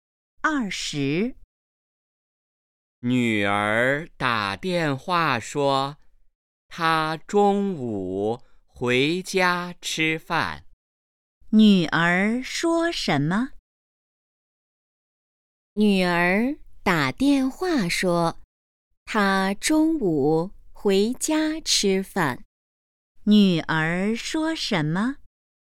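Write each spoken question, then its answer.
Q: 女儿说什么?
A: 她中午回家吃饭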